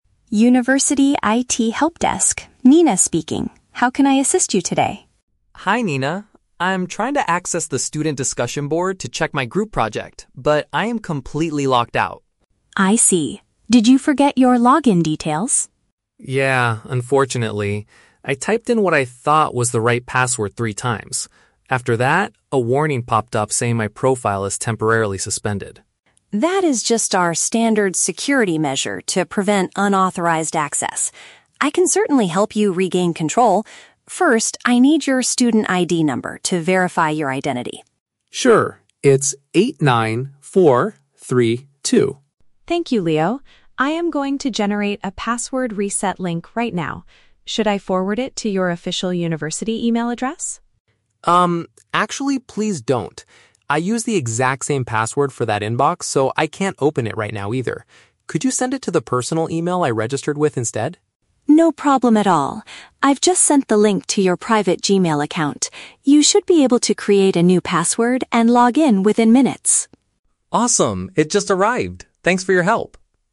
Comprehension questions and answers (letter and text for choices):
Listen to a conversation between a student and an IT support worker. For each question, choose the correct answer (A, B, or C).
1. Why is the student unable to use the online forum?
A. He completely forgot his student identification number.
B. His account was blocked after multiple incorrect attempts.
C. The university website is currently down for maintenance.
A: B. His account was blocked after multiple incorrect attempts.

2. What information does the IT worker request first to help the student?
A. His private phone number.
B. His university identification code.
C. His current home address.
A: B. His university identification code.

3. Why does the student refuse to receive the link via his school email?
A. He is currently unable to access that specific inbox.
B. He rarely checks messages sent by the university.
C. He thinks the system will take too long to deliver it.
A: A. He is currently unable to access that specific inbox.

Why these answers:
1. Leo says he typed the password "three times" (multiple incorrect attempts) and his profile is "temporarily suspended" (blocked). Option (A) is a trap; he forgot his password, not his ID number (he knows his ID is 89432). Option (C) is a plausible reason for a website not working, but it is never mentioned.
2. Nina says, "First, I need your student ID number" (which means university identification code) to verify his identity. Options (A) and (C) are traps; these are common personal details needed for verification, but Nina does not ask for them.
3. Leo explains that he uses the "exact same password for that inbox," so he "can't open it right now either" (unable to access). Options (B) and (C) are traps that describe common student complaints, but they are not the reason Leo gives in the conversation.

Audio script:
Nina: University IT Helpdesk, Nina speaking. How can I assist you today?
Leo: Hi Nina. I'm trying to access the student discussion board to check my group project, but I am completely locked out.
Nina: I see. Did you forget your login details?
Leo: Yeah, unfortunately. I typed in what I thought was the right password three times. After that, a warning popped up saying my profile is temporarily suspended.
Nina: That is just our standard security measure to prevent unauthorized access. I can certainly help you regain control. First, I need your student ID number to verify your identity.
Leo: Sure, it's 89432.
Nina: Thank you, Leo. I am going to generate a password reset link right now. Should I forward it to your official university email address?
Leo: Um, actually, please don't. I use the exact same password for that inbox, so I can't open it right now either. Could you send it to the personal email I registered with instead?
Nina: No problem at all. I've just sent the link to your private Gmail account. You should be able to create a new password and log in within minutes.
Leo: Awesome, it just arrived. Thanks for your help!